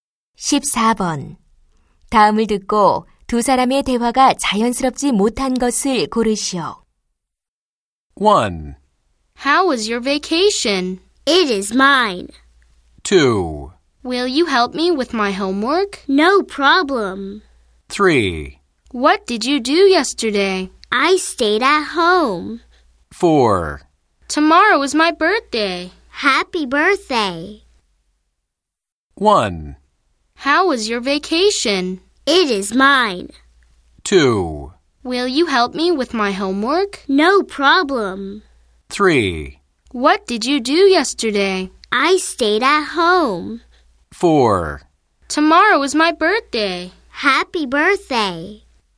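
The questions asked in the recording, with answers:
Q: 다음을 듣고 두 사람의 대화가 자연스럽지 못한 것을 고르시오.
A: 1: How was your vacation? / It is mine.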